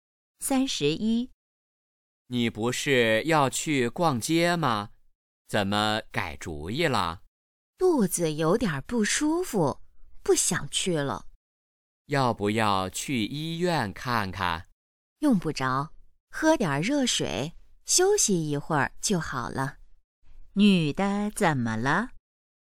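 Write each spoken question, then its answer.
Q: 女的怎么了?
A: 肚子不舒服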